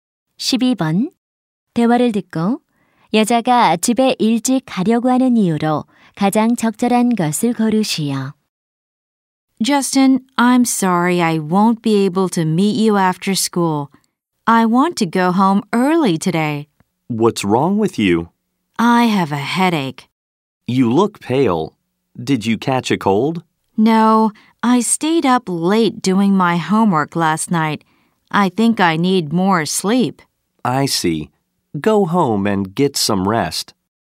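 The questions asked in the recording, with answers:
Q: 대화를 듣고 여자가 집에 일찍 가려고 하는 이유로 가장 적절한 것을 고르시오.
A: 두통이 있어서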